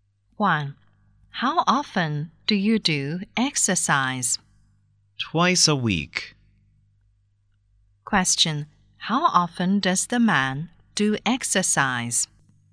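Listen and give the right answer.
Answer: Twice a week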